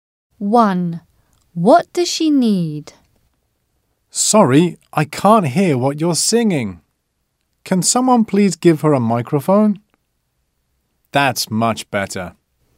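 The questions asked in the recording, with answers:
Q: What does she need?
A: a microphone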